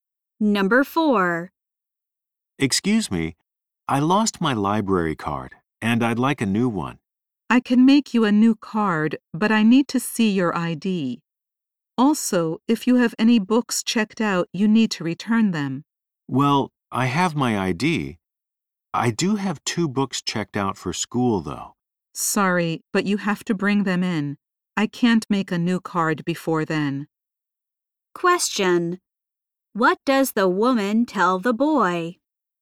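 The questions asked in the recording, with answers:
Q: What does the woman tell the boy?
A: He must return his checked-out books before she can make a new card.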